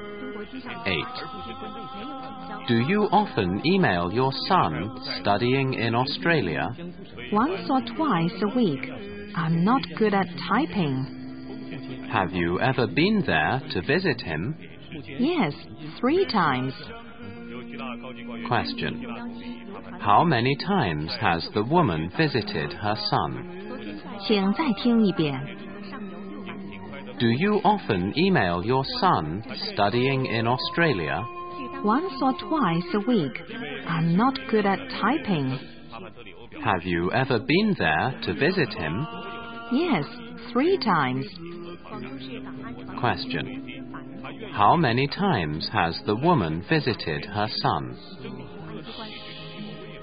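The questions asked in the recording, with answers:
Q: How many times has the woman visited her son?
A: 3 times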